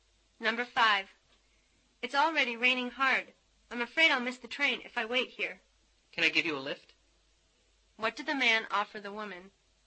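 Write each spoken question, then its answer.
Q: What did the man offer the woman?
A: A lift (a ride).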